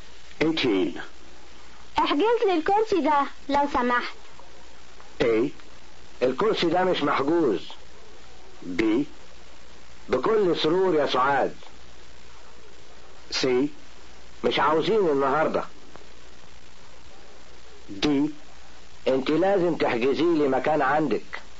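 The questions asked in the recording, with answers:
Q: احجز لي الكرسي ده لو سمحت.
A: B: بكل سرور يا سعاد.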